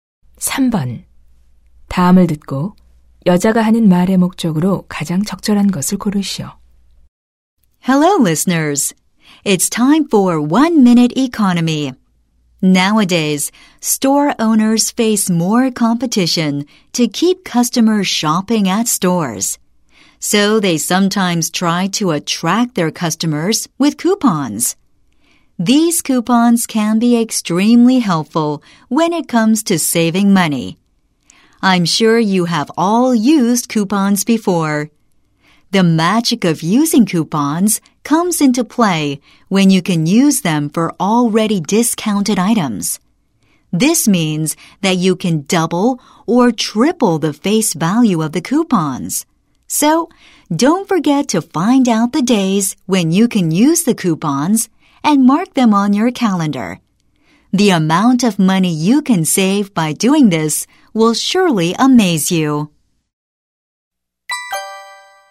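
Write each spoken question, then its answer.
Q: 다음을 듣고 여자가 하는 말의 목적으로 가장 적절한 것을 고르시오.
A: 할인 상품에 쿠폰을 사용하여 돈을 절약하는 방법을 알려 주려고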